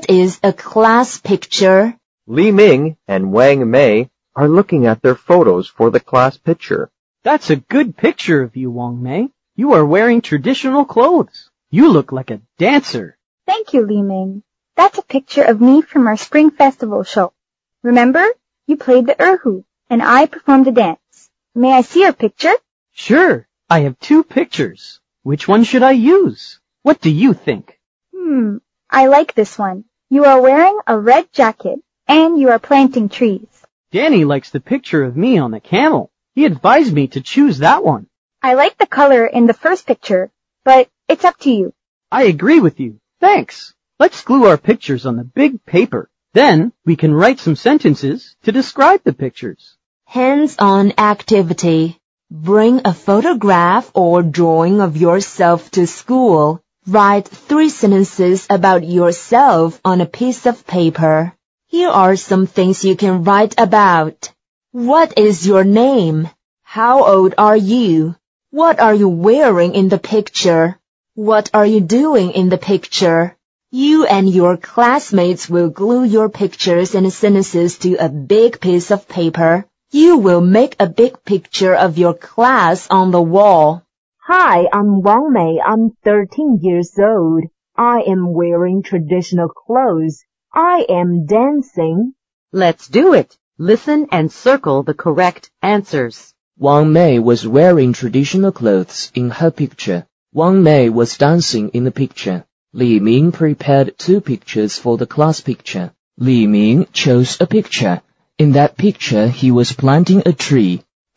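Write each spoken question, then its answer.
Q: Wang Mei was wearing traditional clothes in her picture.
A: True

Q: Wang Mei was dancing in the picture.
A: True

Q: Li Ming prepared 2 pictures for the class picture.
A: True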